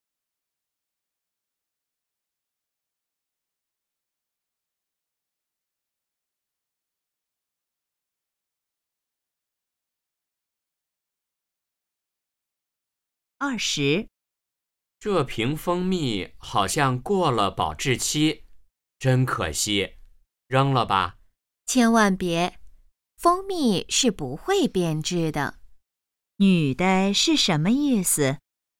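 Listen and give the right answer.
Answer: 蜂蜜不会变质,不用扔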